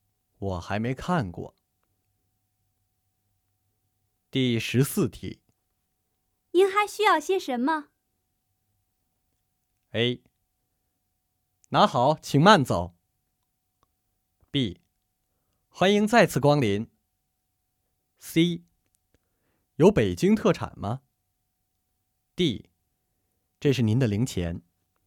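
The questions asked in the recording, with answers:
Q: 您还需要些什么?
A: C: 有北京特产吗?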